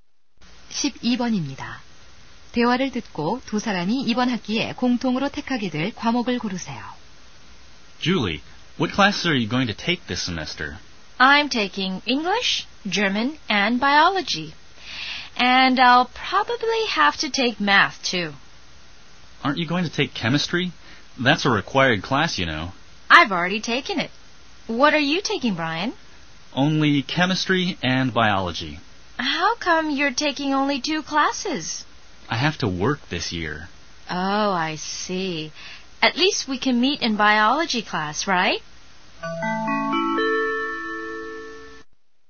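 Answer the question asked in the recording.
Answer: 생물학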